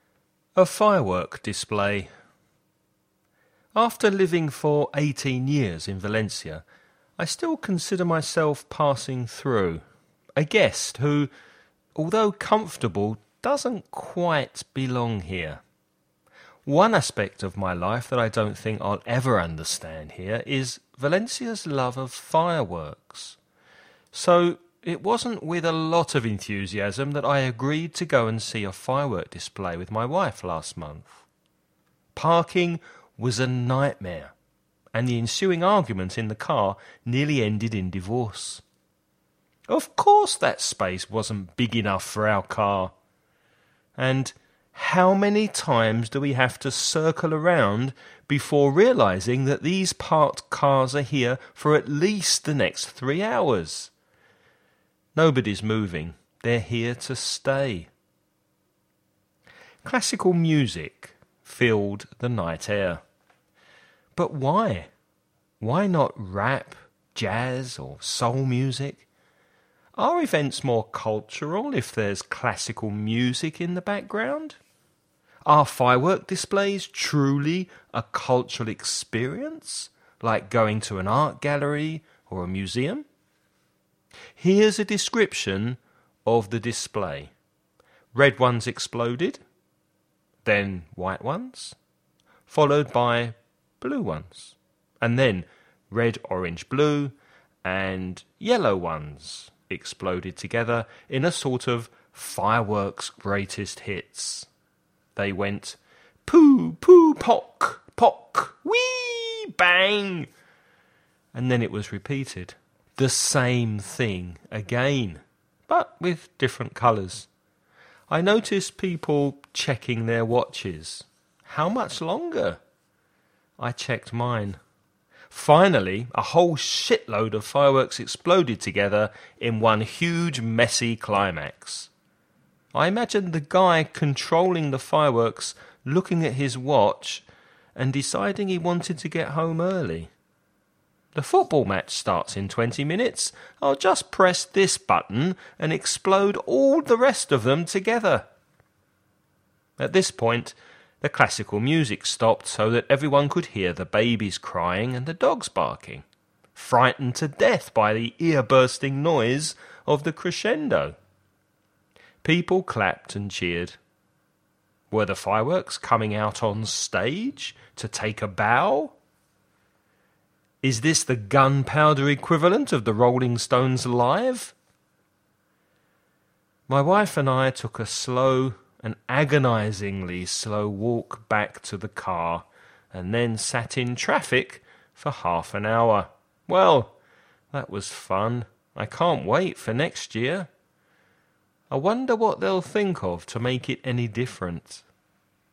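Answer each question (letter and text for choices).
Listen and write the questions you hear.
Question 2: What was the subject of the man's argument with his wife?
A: Parking

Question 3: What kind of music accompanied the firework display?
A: Classical music

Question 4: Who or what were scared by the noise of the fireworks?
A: Babies and dogs

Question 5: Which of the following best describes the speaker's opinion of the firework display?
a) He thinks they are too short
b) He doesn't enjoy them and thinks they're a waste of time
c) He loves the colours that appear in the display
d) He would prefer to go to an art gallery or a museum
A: b) He doesn't enjoy them and thinks they're a waste of time

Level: nivel avanzado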